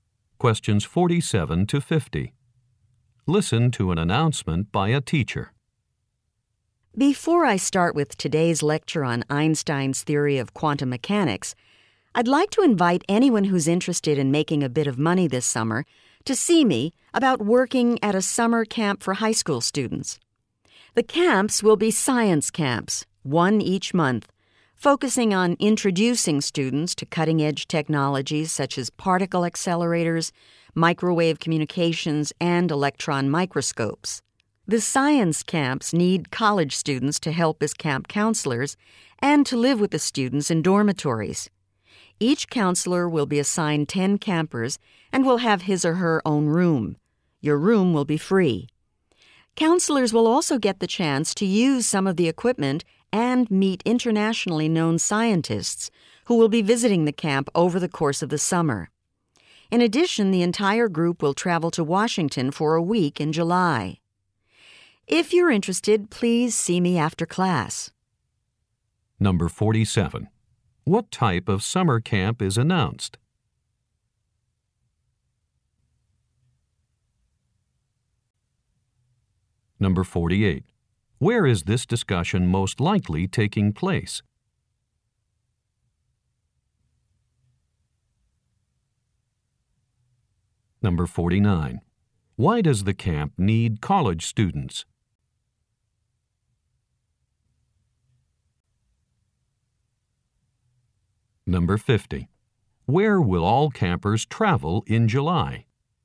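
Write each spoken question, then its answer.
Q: What type of summer camp is announced?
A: A science camp

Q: Where is this discussion most likely taking place?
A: In a classroom

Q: Why does the camp need college students?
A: To work as camp counselors

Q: Where will all campers travel in July?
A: To Washington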